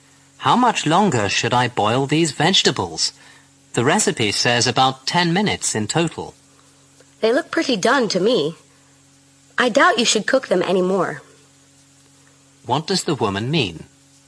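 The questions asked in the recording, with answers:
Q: What does the woman mean?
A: The vegetables are already done and need no more cooking.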